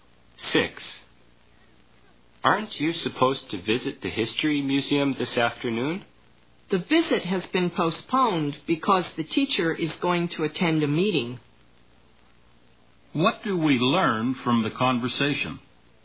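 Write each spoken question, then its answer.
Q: What do we learn from the conversation?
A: The museum visit has been postponed because the teacher has a meeting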